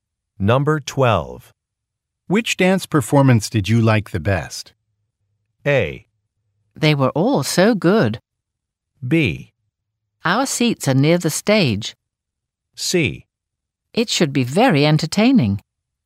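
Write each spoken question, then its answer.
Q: Which dance performance did you like the best?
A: A: They were all so good.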